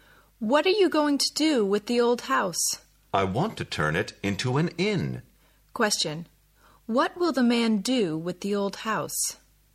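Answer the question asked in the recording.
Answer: Turn it into an inn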